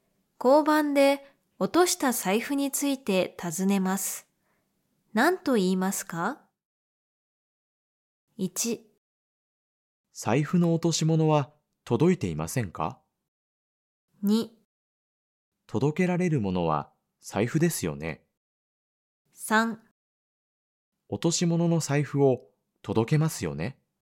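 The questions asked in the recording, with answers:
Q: 交番で落とした財布について尋ねます。何と言いますか?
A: 1: 財布の落とし物は届いていませんか?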